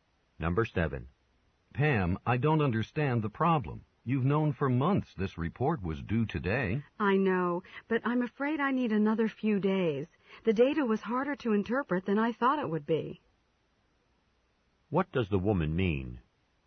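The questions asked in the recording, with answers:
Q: What does the woman mean?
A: She needs a few more days to finish the report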